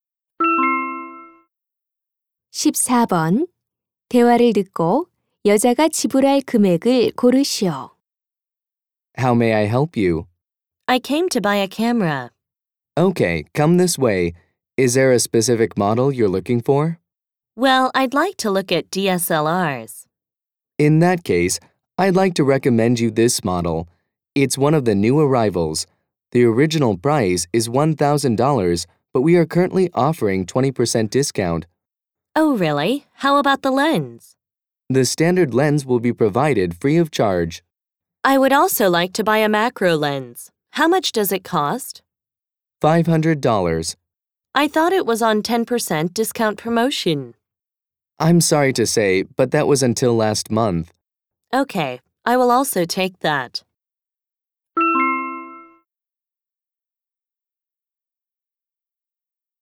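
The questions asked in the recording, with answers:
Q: 대화를 듣고 여자가 지불할 금액을 고르시오.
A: $1,300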